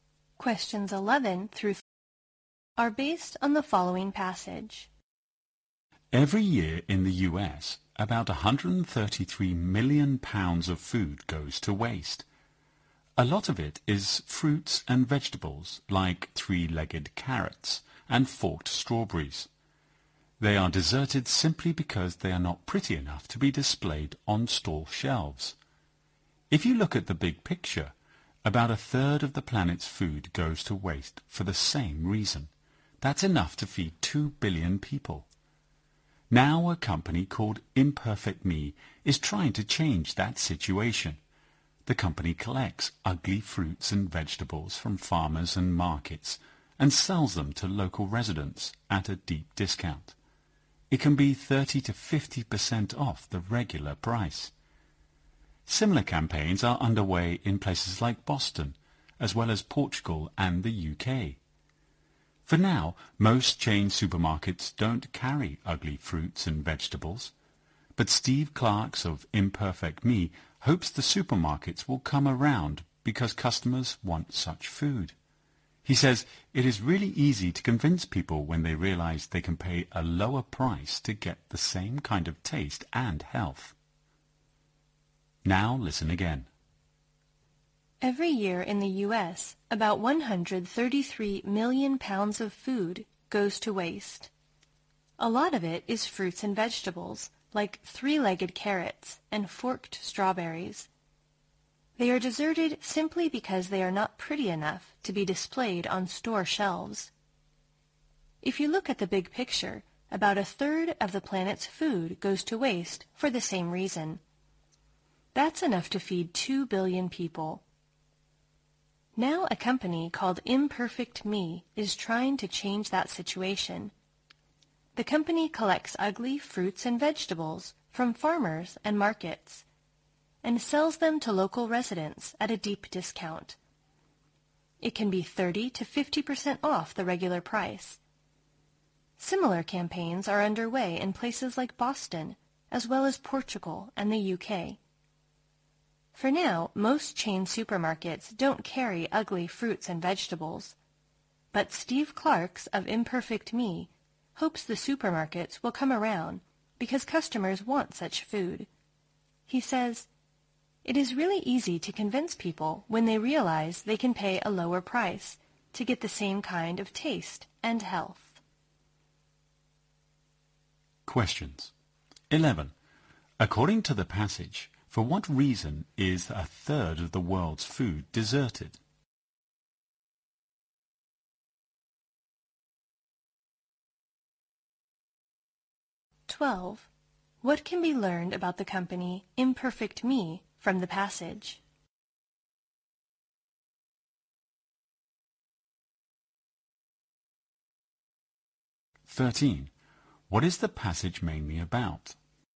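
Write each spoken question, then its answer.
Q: According to the passage, for what reason is a third of the world's food deserted?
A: It is not pretty enough to be displayed on store shelves

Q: What can be learned about the company Imperfect Me from the passage?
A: It sells ugly fruits and vegetables to local residents at a deep discount

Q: What is the passage mainly about?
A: Selling ugly fruits and vegetables to reduce food waste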